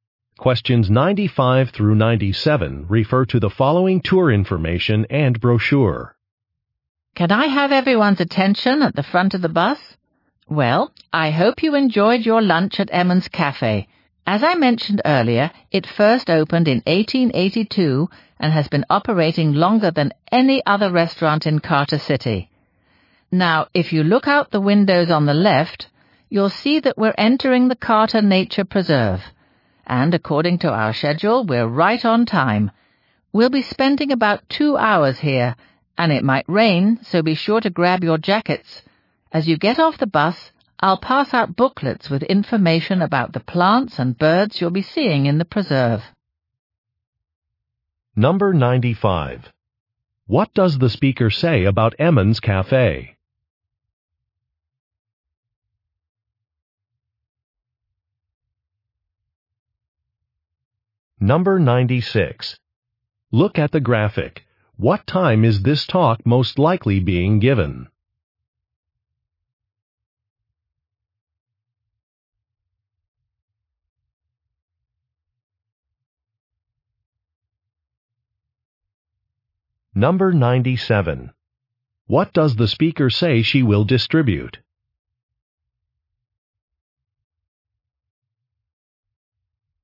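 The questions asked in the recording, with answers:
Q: What does the speaker say about Emmons Cafe?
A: It is the oldest restaurant in the city

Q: What does the speaker say she will distribute?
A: Booklets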